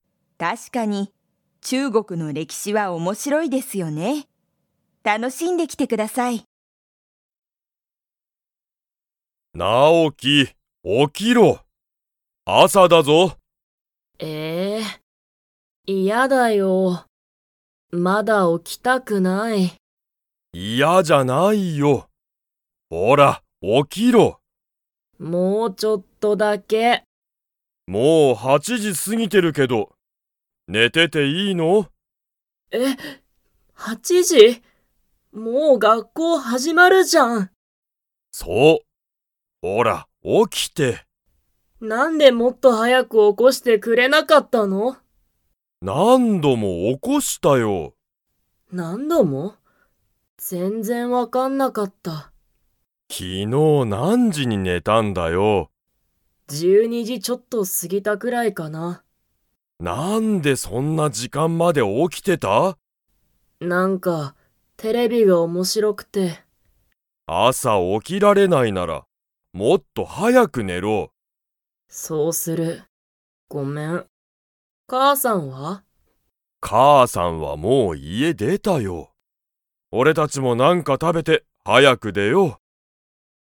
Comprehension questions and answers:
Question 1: 今いまはもう 時じ過すぎてる。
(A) 7しち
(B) 8はち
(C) 11じゅういち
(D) 12じゅうに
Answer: (B) 8はち

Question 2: 母かあさんはもう家いえを出でましたか?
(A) はい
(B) いいえ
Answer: (A) はい

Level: Level 3

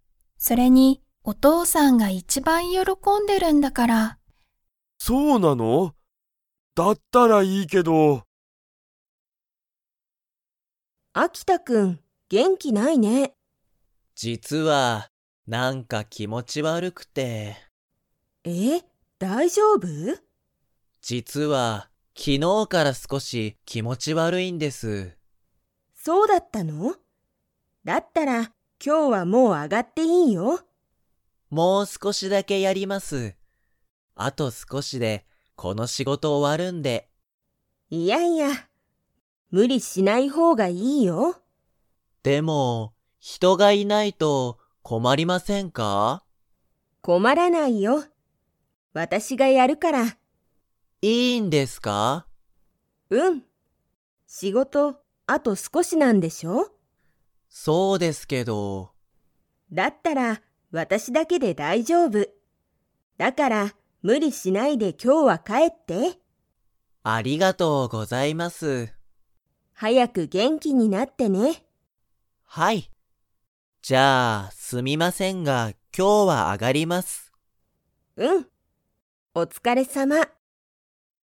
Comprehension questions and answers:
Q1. 秋田あきたくんはいつから気持きもち悪わるいですか?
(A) この前まえ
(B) 今日きょう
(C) 昨日きのう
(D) 今年ことし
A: (C) 昨日きのう

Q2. 秋田あきたくんはこのあと 。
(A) 上あがる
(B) 上あがらない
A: (A) 上あがる

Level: Level 3

